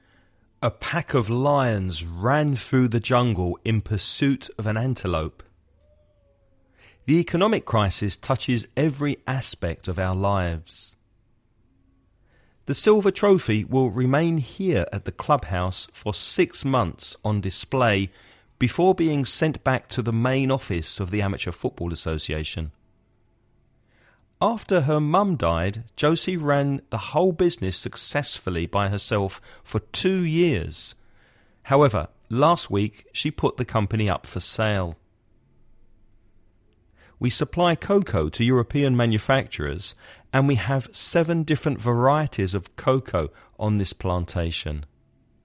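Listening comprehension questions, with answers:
Choose the correct word for each sentence.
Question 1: A pack of lions ran through the jungle in of an antelope.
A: pursuit

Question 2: The economic crisis touches every of our lives.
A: aspect

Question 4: After her mum died, Josie ran the whole successfully by herself for years. However, last week she put the company up for sale.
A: business

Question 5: We supply cocoa to European manufacturers and we have 7 different of cocoa on this plantation.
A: varieties

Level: Avanzado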